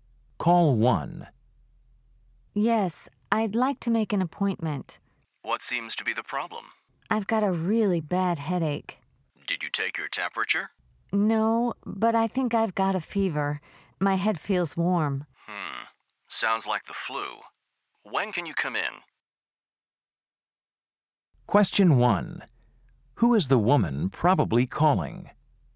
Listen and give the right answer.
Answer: Health clinic, may I help you?